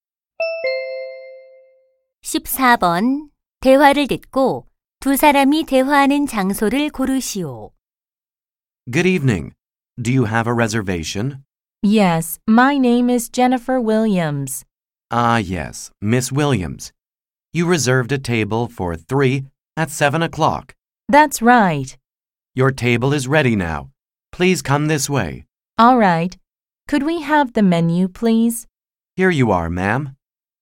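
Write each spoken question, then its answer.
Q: 대화를 듣고 두 사람이 대화하는 장소를 고르시오.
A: 식당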